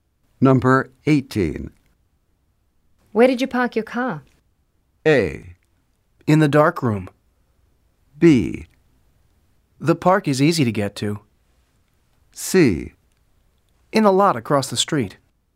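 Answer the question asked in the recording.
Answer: C: In the lot across the street.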